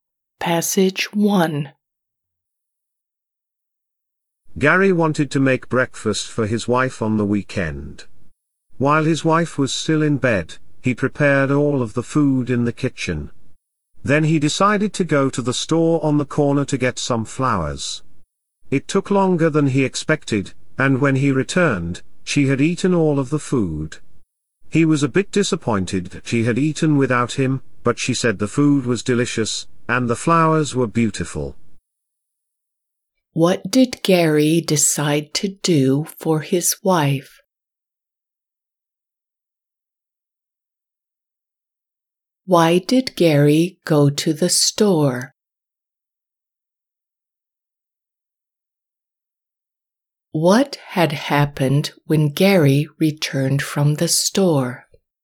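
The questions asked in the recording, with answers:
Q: What did Gary decide to do for his wife?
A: make her breakfast

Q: Why did Gary go to the store?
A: to get some flowers

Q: What had happened when Gary returned from the store?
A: his wife had eaten all the food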